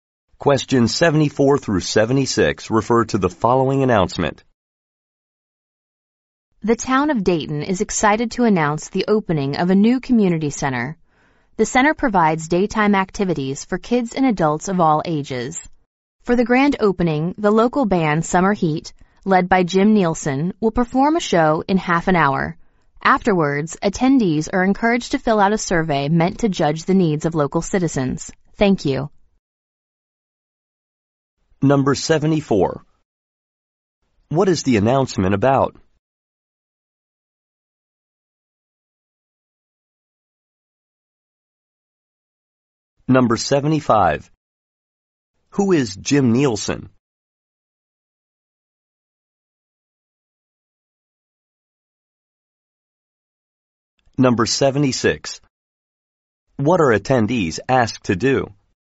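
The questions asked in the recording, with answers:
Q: What is the announcement about?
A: The opening of a new community center

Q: Who is Jim Nielsen?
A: The leader of the band Summer Heat

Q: What are attendees asked to do?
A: Fill out a survey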